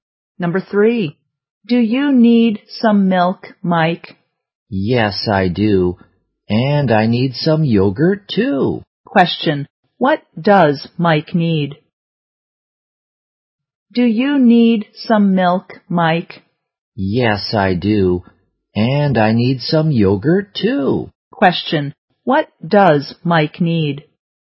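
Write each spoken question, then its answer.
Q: what does Mike need?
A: Some milk and some yogurt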